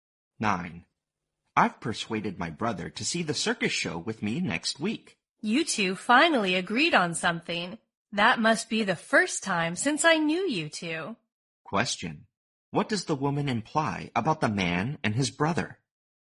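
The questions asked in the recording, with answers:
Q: What does the woman imply about the man and his brother?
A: They rarely agree on anything.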